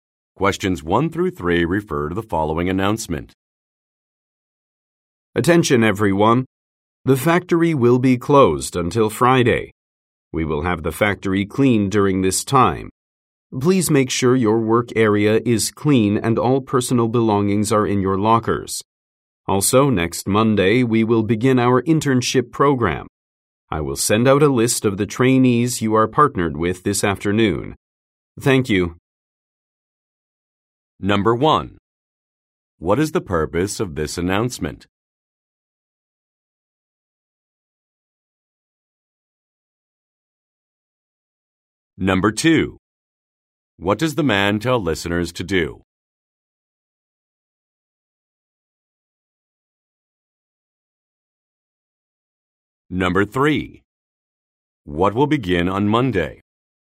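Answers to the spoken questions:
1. To announce the factory will be closed until Friday for cleaning
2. Clean their work areas and put belongings in lockers
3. An internship program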